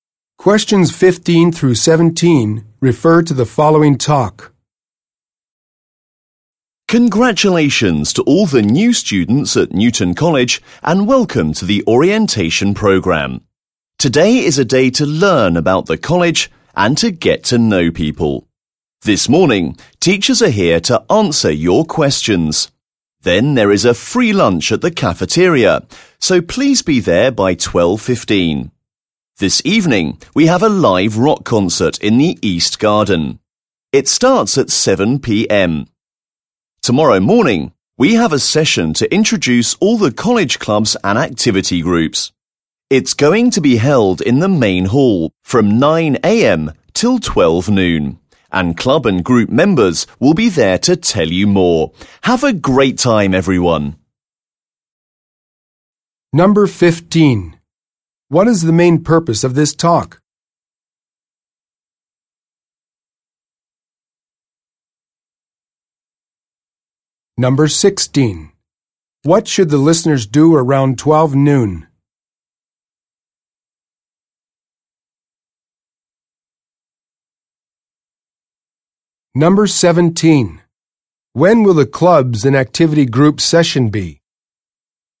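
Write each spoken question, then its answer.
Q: What is the main purpose of this talk?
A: To welcome new students to the orientation program

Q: What should the listeners do around 12 noon?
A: Go to the cafeteria for a free lunch

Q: When will the clubs and activity group session be?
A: Tomorrow morning, 9 a.m. to 12 noon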